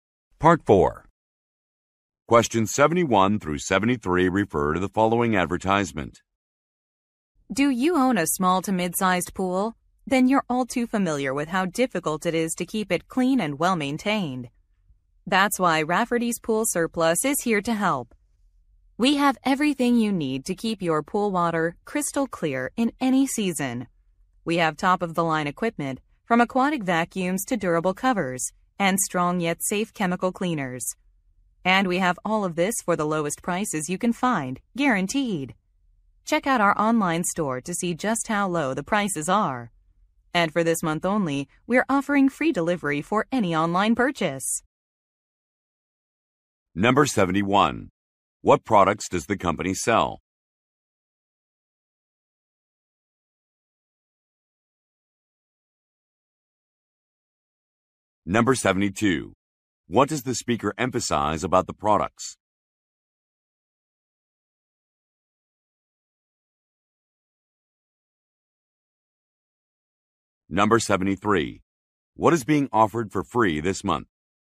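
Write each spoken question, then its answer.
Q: What products does the company sell?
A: Pool cleaning and maintenance equipment and supplies

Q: What does the speaker emphasize about the products?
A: They have the lowest prices, guaranteed

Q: What is being offered for free this month?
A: Delivery for online purchases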